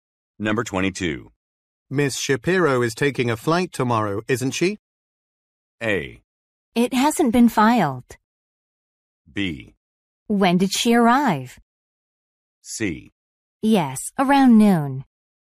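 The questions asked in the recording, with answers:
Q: Miss Shapiro is taking a flight tomorrow, isn't she?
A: C: Yes, around noon.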